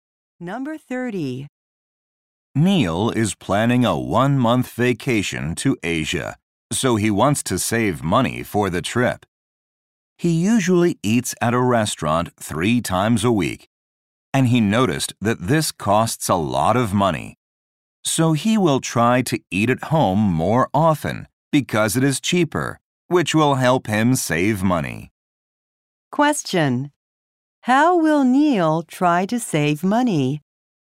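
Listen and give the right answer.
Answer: Eat at home more often.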